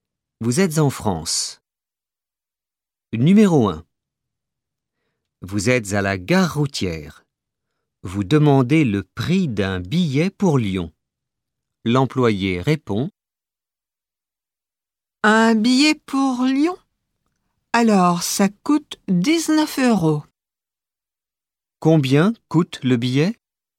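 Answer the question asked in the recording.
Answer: 19 euros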